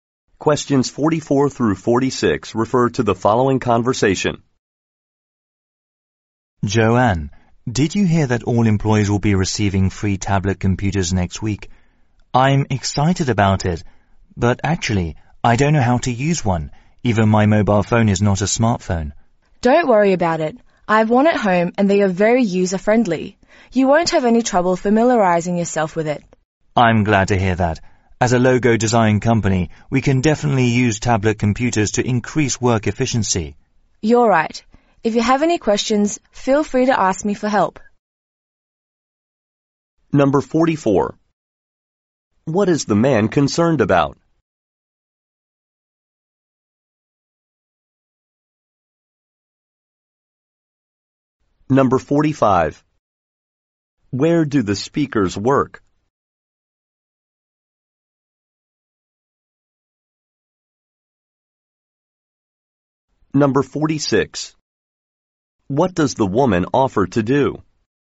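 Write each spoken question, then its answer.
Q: Where do the speakers work?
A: At a logo design company

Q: What does the woman offer to do?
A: Help him with any questions about the tablet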